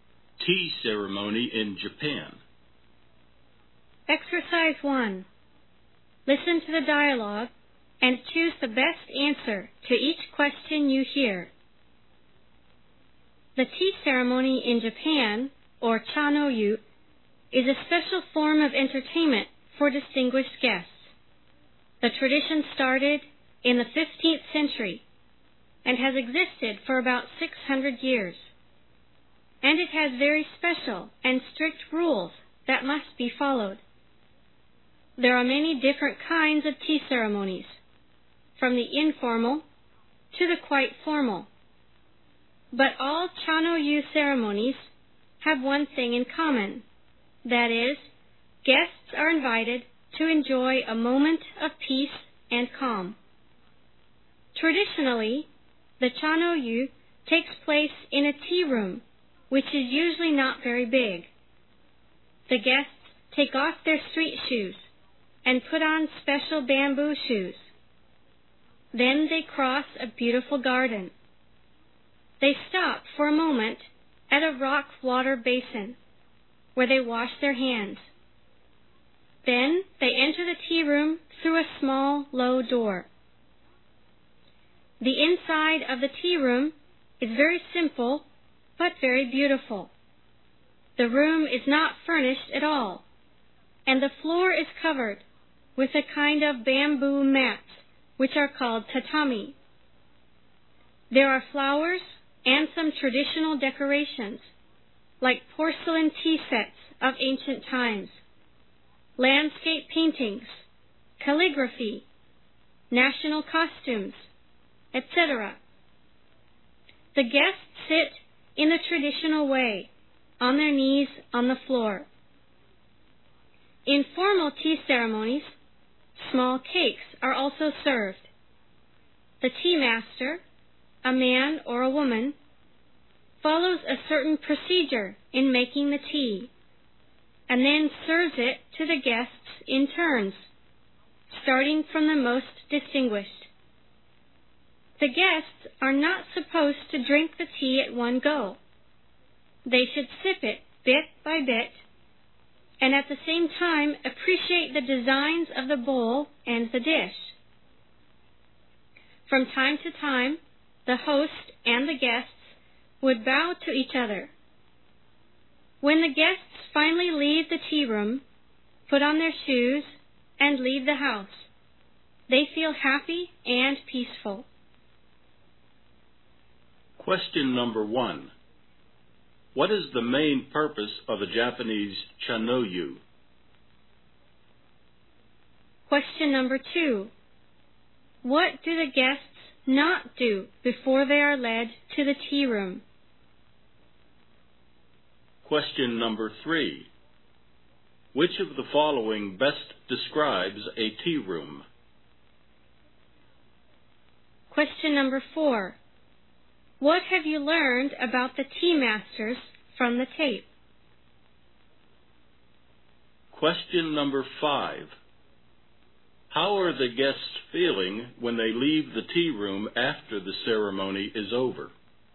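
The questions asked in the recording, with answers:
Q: What is the main purpose of a Japanese chanoyu?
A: To invite guests to enjoy a moment of peace and calm

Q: How are the guests feeling when they leave the tea room after the ceremony is over?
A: Happy and peaceful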